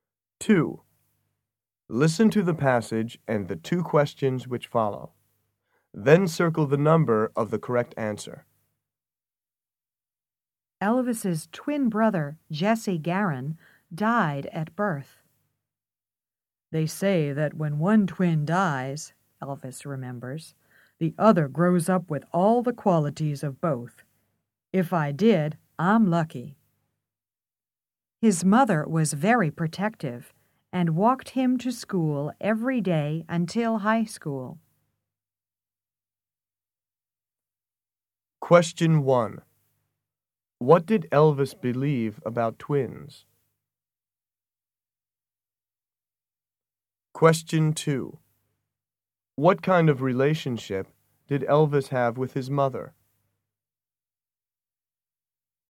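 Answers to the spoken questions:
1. When one twin dies, the other grows up with the qualities of both.
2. A close one; she was very protective of him.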